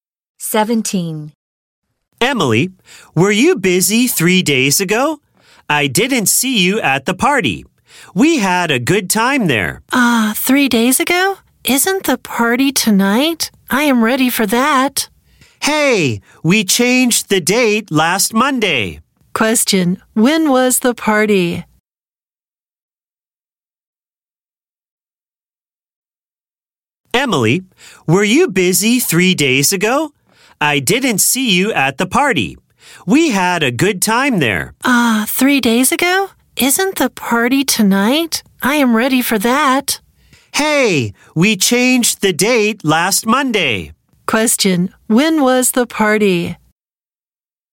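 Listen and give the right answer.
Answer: 3 days ago.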